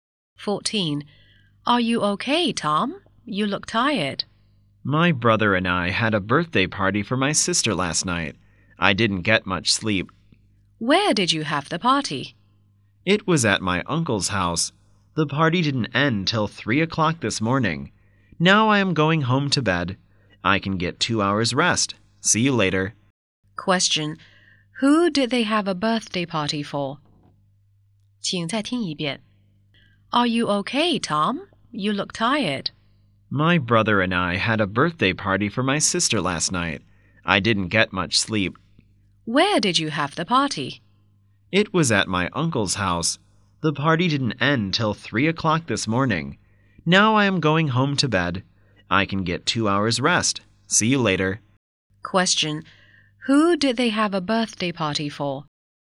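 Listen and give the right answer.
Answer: Tom's sister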